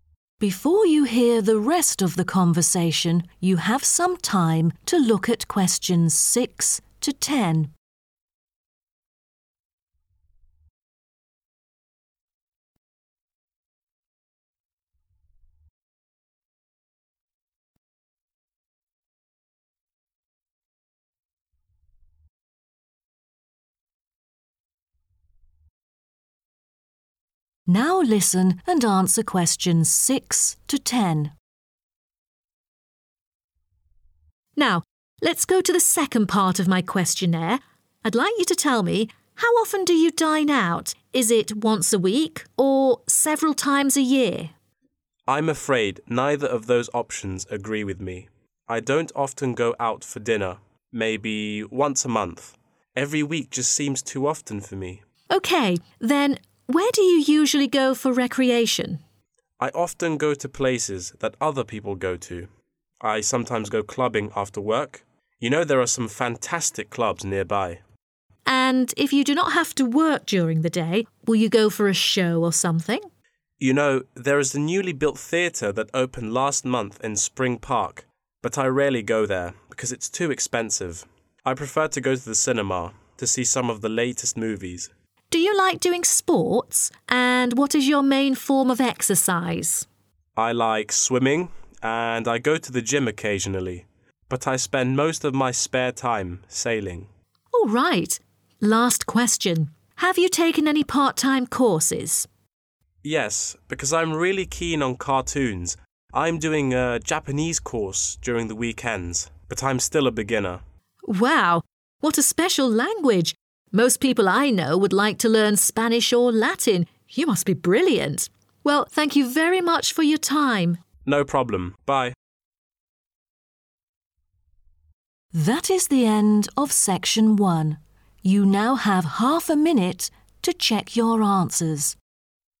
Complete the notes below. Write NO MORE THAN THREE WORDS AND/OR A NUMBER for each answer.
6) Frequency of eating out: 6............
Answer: once a month

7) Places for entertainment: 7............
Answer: clubs

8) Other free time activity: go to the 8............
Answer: cinema

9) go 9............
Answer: sailing

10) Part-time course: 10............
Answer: Japanese